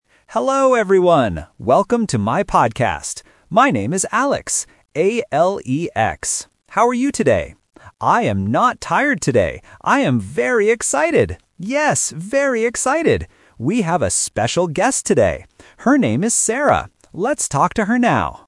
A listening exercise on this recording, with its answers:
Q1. What is the host's name?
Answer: Alex

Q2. How does the host feel today?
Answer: Excited

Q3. Who is the special guest today?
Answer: Sarah

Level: A1